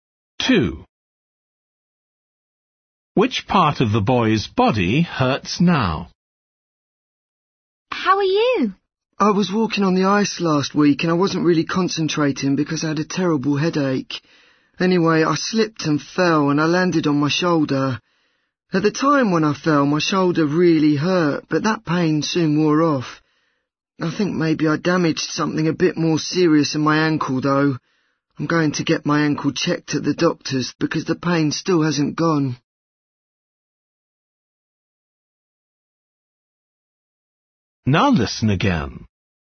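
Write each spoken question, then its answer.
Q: Which part of the boy's body hurts now?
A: his ankle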